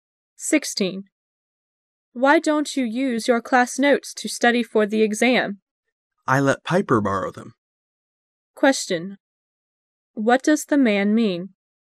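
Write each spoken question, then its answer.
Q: What does the man mean?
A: He doesn't have his notes because he lent them to Piper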